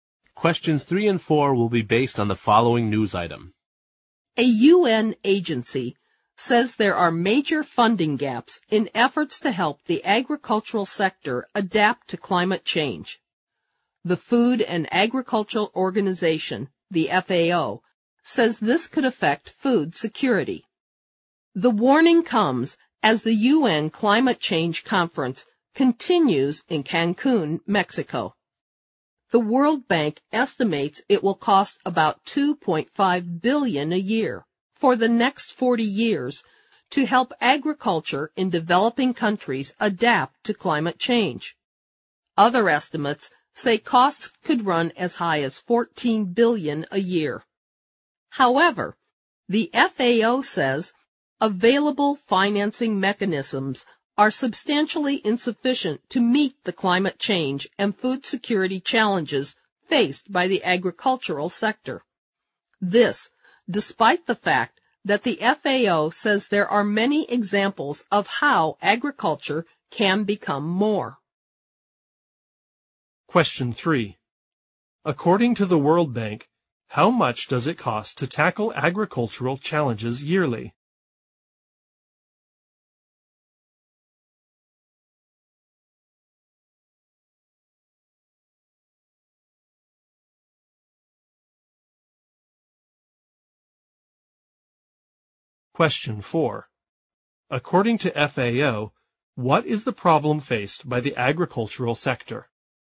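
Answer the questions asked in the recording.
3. About $2.5 billion a year
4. Available financing is substantially insufficient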